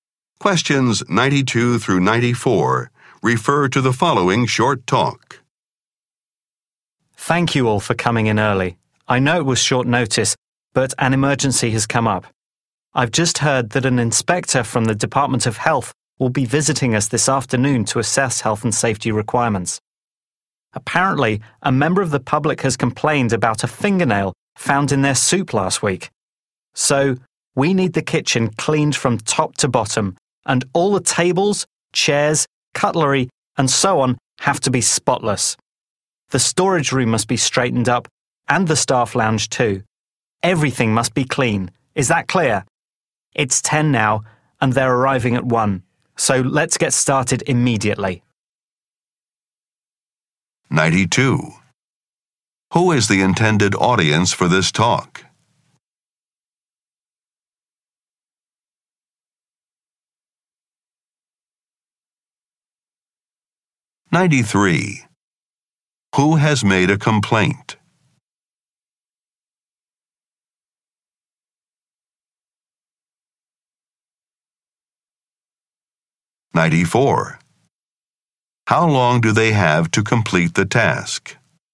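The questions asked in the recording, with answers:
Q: Who is the intended audience for this talk?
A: Restaurant staff

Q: Who has made a complaint?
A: A member of the public

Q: How long do they have to complete the task?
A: 3 hours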